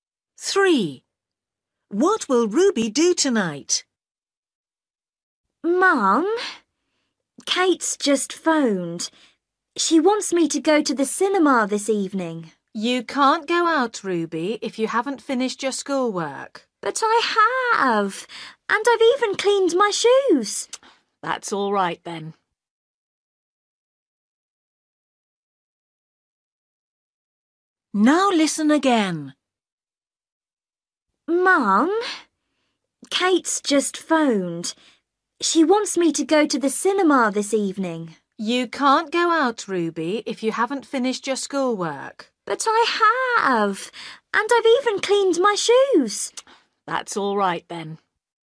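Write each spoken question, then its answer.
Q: What will Ruby do tonight?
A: Go to the cinema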